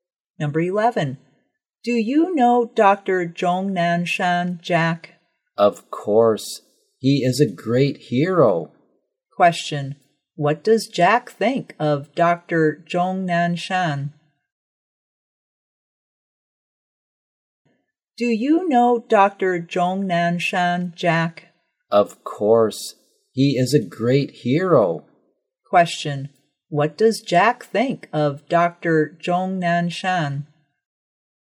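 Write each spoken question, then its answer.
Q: What does Jack think of Dr. Zhong Nanshan?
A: He is a great hero.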